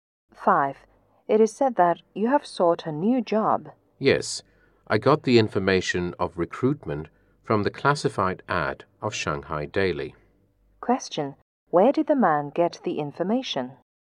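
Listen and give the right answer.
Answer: From the classified ad of Shanghai Daily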